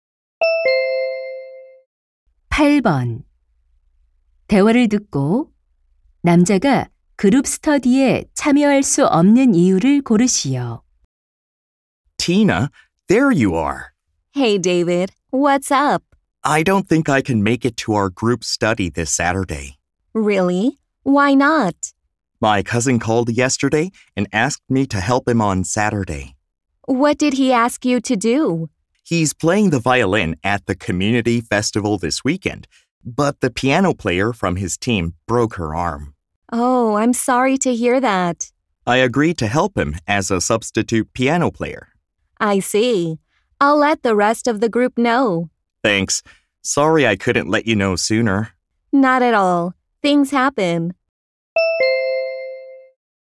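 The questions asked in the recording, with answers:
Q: 대화를 듣고 남자가 그룹 스터디에 참여할 수 없는 이유를 고르시오.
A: 사촌의 공연에서 대신 피아노를 연주해야 해서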